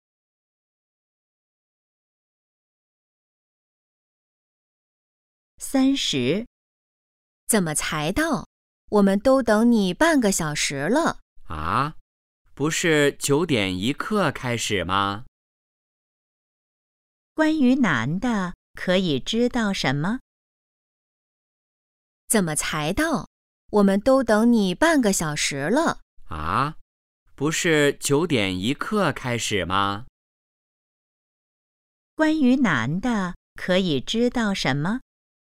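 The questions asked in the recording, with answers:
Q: 关于男的可以知道什么?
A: 他迟到了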